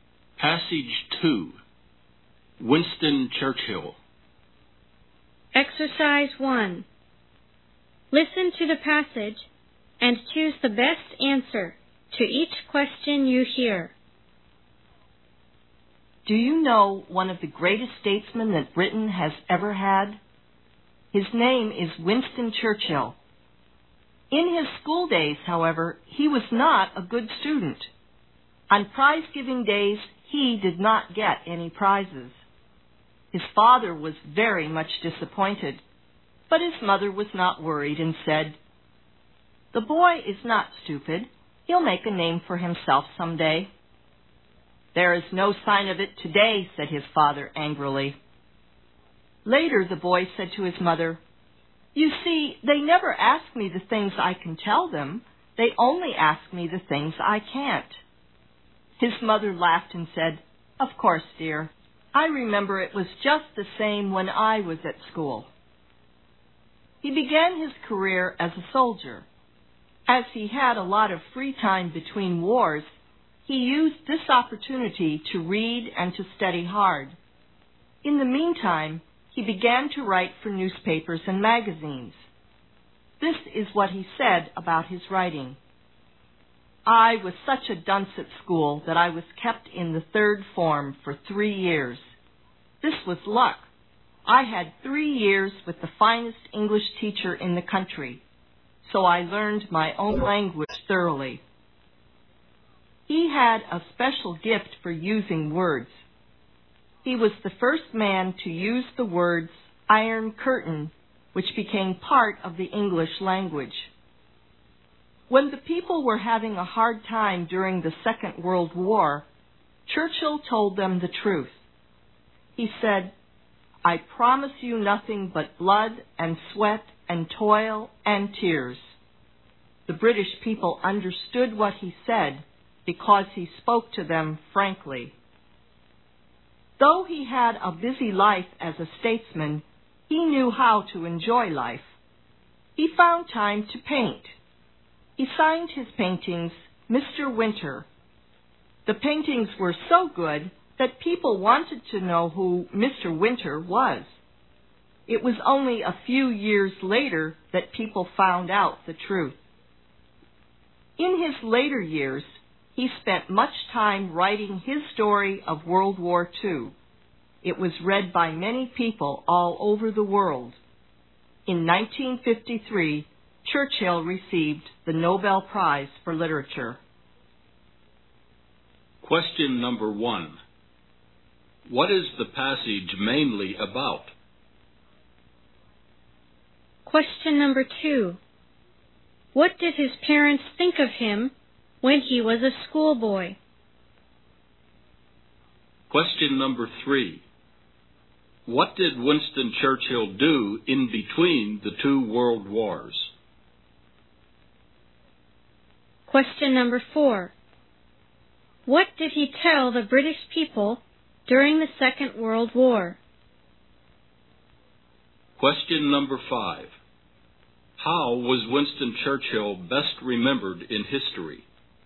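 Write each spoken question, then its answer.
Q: What is the passage mainly about?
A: The life of Winston Churchill

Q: What did his parents think of him when he was a schoolboy?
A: His father was disappointed; his mother thought he was not stupid and would make a name for himself

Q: What did he tell the British people during the Second World War?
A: The truth: he promised nothing but blood, sweat, toil and tears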